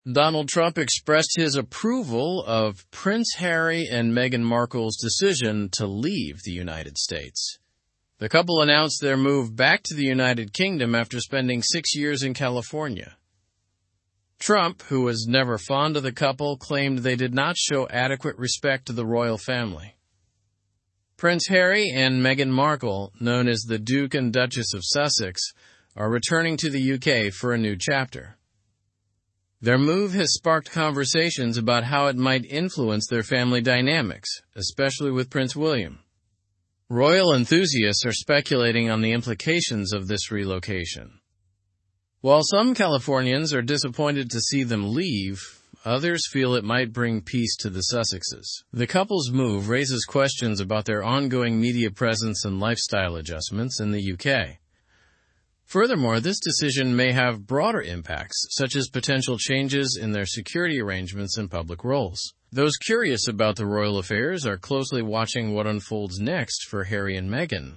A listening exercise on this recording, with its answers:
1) What did Donald Trump express about Harry and Meghan's decision?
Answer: He expressed his approval of their decision to leave the United States.

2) Where are Prince Harry and Meghan Markle moving to?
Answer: They are moving back to the United Kingdom.

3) How long did Harry and Meghan live in California?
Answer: They lived in California for six years.

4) Who are speculating on the implications of the couple's relocation?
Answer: Royal enthusiasts are speculating on the implications of their relocation.

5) What feelings do some Californians have about their departure?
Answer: Some Californians are disappointed to see them leave.

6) What questions does the couple's move raise?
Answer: It raises questions about their media presence and lifestyle adjustments in the UK.

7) What broader impacts could their decision have?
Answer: The decision may have impacts on their security arrangements and public roles.

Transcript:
Donald Trump expressed his approval of Prince Harry and Meghan Markle's decision to leave the United States. The couple announced their move back to the United Kingdom after spending six years in California. Trump, who was never fond of the couple, claimed they did not show adequate respect to the Royal Family.
Prince Harry and Meghan Markle, known as the Duke and Duchess of Sussex, are returning to the UK for a new chapter. Their move has sparked conversations about how it might influence their family dynamics, especially with Prince William. Royal enthusiasts are speculating on the implications of this relocation.
While some Californians are disappointed to see them leave, others feel it might bring peace to the Sussexes. The couple's move raises questions about their ongoing media presence and lifestyle adjustments in the UK.
Furthermore, this decision may have broader impacts, such as potential changes in their security arrangements and public roles.

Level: Level 3